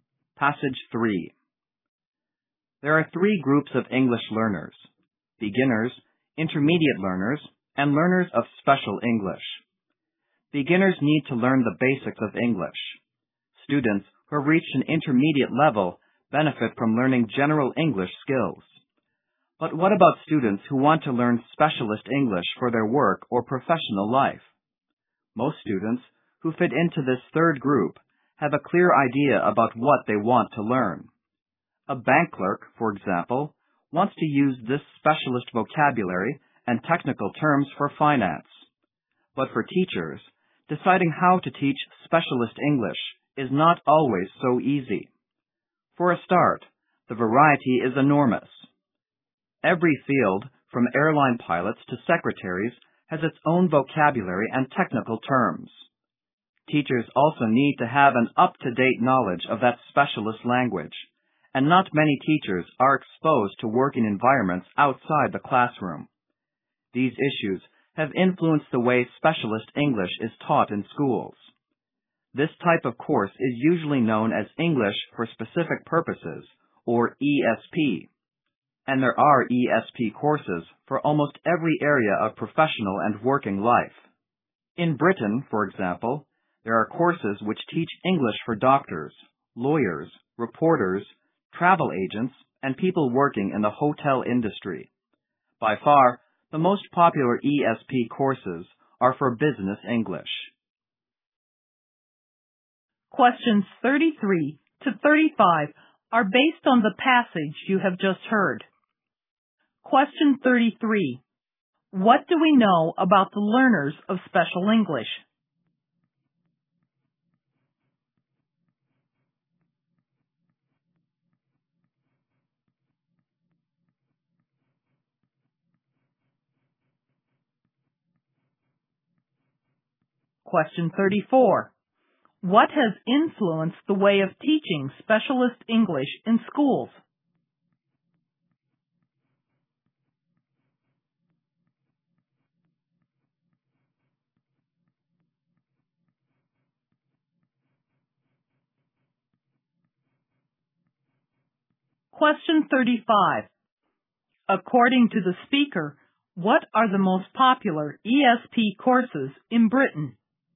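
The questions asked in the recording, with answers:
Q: What do we know about the learners of special English?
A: They have a clear idea of what they want to learn.

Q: What has influenced the way of teaching specialist English in schools?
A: The huge variety of fields and teachers' lack of up-to-date knowledge of specialist language.

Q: According to the speaker, what are the most popular ESP courses in Britain?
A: Business English courses.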